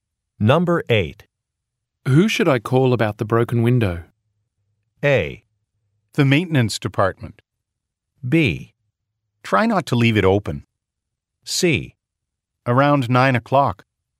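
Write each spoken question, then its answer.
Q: Who should I call about the broken window?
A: A: The maintenance department.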